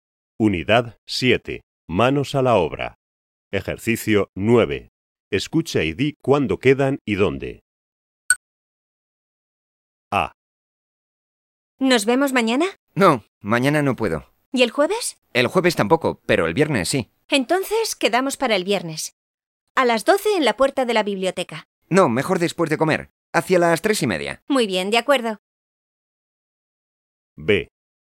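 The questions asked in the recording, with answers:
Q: Escucha y di cuándo quedan y dónde.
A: El viernes hacia las 3:30, en la puerta de la biblioteca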